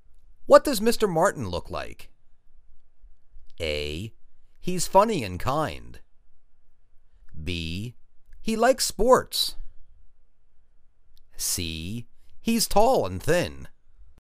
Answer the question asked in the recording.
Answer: He's tall and thin.